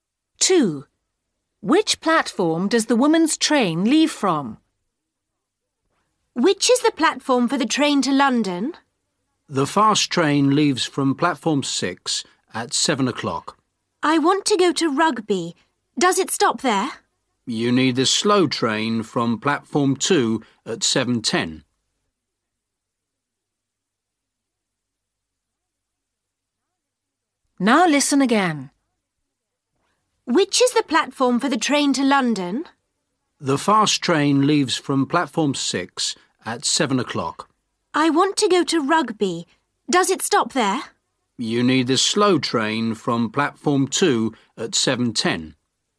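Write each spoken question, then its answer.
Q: Which platform does the woman's train leave from?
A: Platform 2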